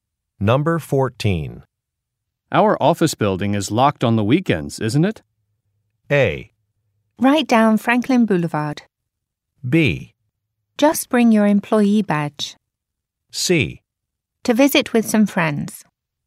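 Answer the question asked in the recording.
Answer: B: Just bring your employee badge.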